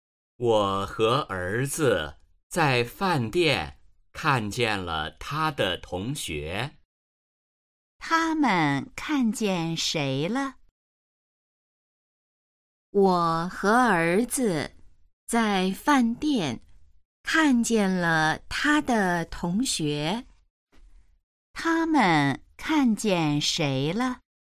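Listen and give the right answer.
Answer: 儿子的同学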